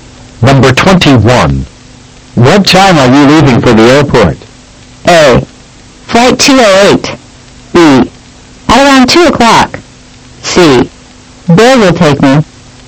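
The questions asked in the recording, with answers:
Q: What time are you leaving for the airport?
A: B: At around 2 o'clock.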